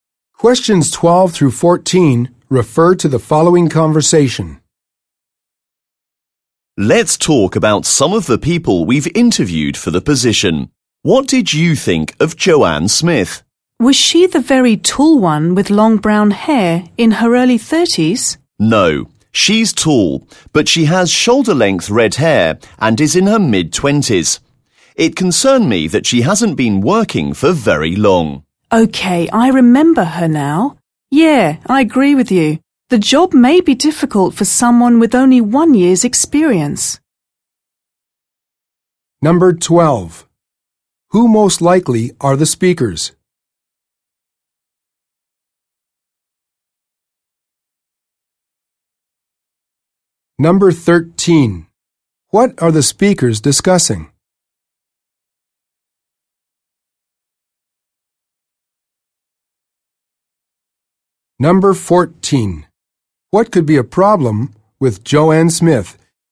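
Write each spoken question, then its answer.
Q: What are the speakers discussing?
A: Job candidates they interviewed

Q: What could be a problem with Joanne Smith?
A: She has only 1 year's experience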